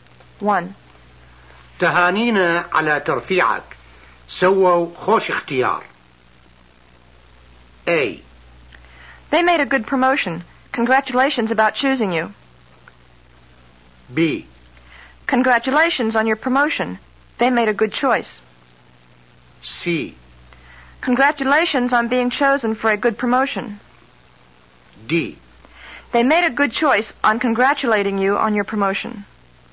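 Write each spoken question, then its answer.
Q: تهانينا على ترفيعك. سووا خوش اختيار.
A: B: Congratulations on your promotion. They made a good choice.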